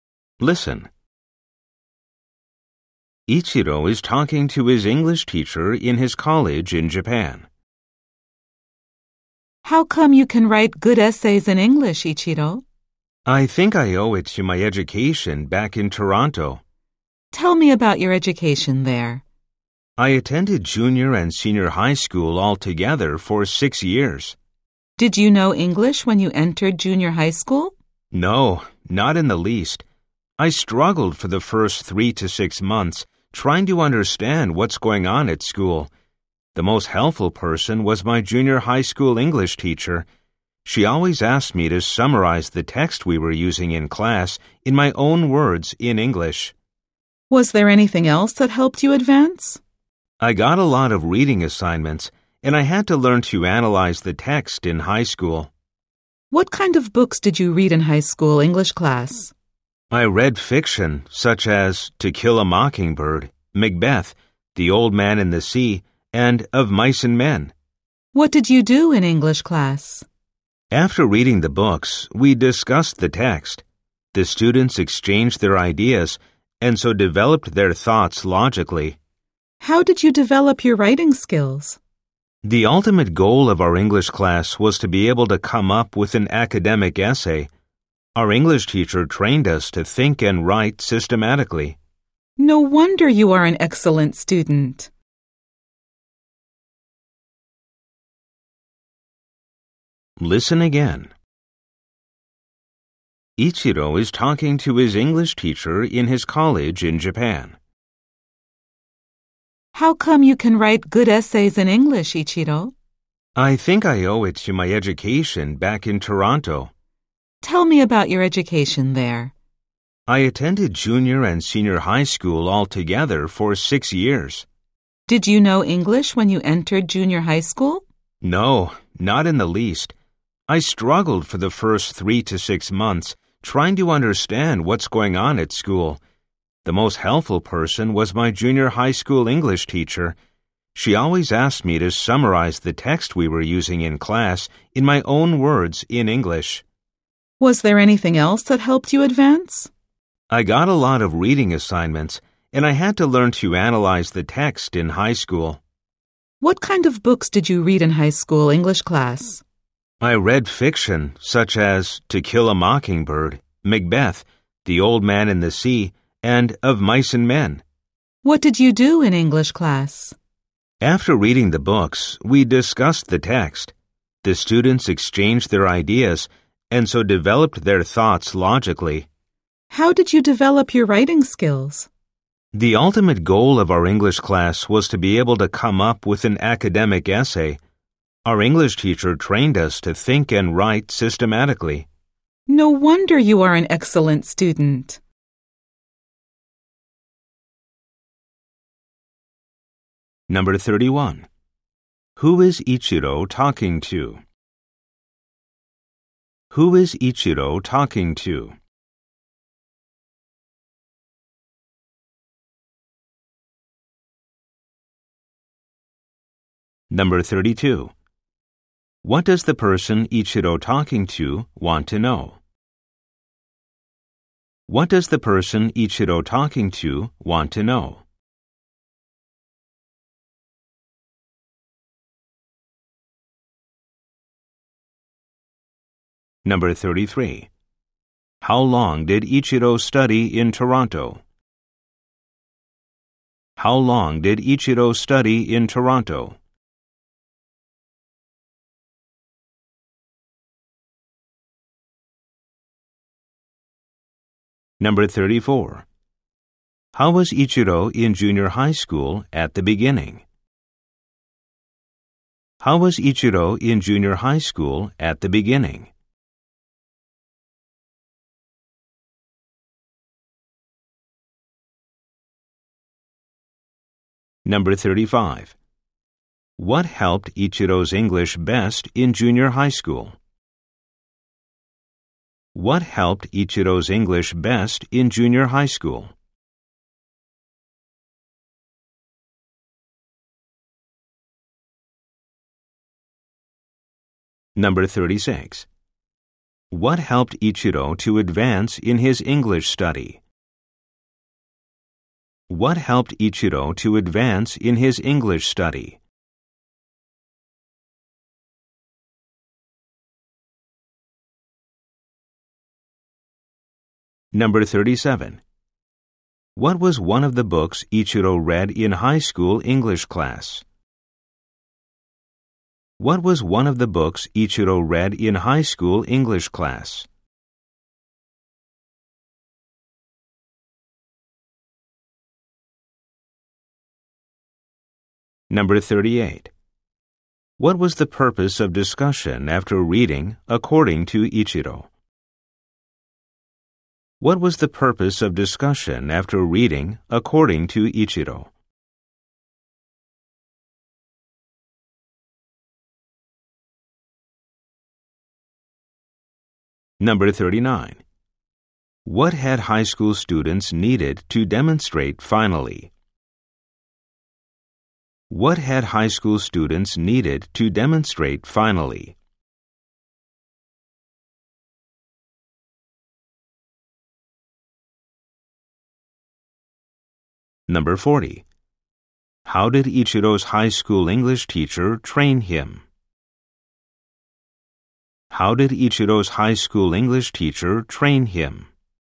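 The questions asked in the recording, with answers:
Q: Who is Ichiro talking to?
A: His English teacher at his college in Japan

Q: What does the person Ichiro talking to want to know?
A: How he can write good essays in English

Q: How long did Ichiro study in Toronto?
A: Six years

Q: How was Ichiro in junior high school at the beginning?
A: He struggled because he didn't know any English.

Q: What helped Ichiro's English best in junior high school?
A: His English teacher had him summarize texts in his own words in English.

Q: What helped Ichiro to advance in his English study?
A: Lots of reading assignments and learning to analyze texts

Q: What was one of the books Ichiro read in high school English class?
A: To Kill a Mockingbird (or Macbeth, The Old Man and the Sea, Of Mice and Men)

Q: What was the purpose of discussion after reading, according to Ichiro?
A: To exchange ideas and develop their thoughts logically

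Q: What had high school students needed to demonstrate finally?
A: The ability to write an academic essay

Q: How did Ichiro's high school English teacher train him?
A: To think and write systematically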